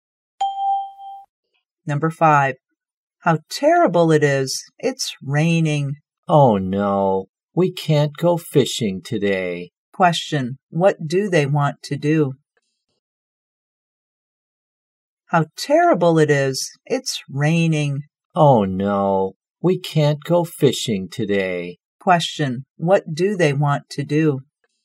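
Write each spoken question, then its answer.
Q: Question, what do they want to do?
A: Go fishing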